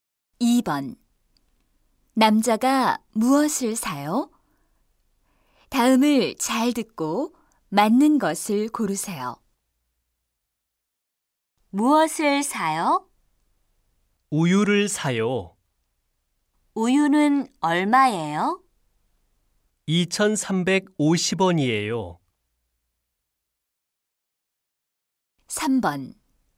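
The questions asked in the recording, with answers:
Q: 남자가 무엇을 사요?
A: 우유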